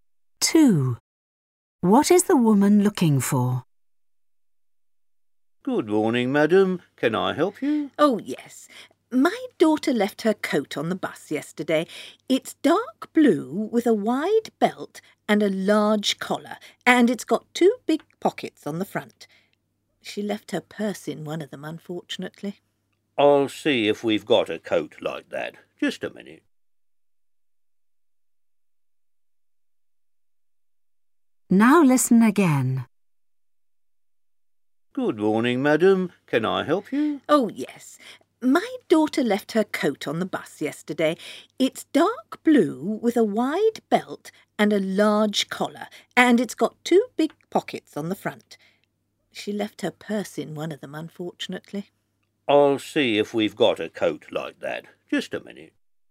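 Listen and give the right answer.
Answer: A dark blue coat with a wide belt, a large collar and two big front pockets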